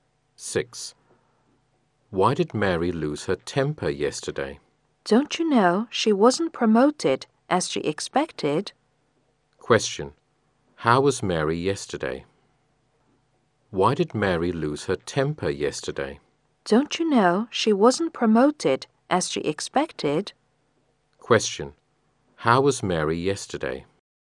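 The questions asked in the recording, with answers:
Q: How was Mary yesterday?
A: Angry, because she wasn't promoted as she expected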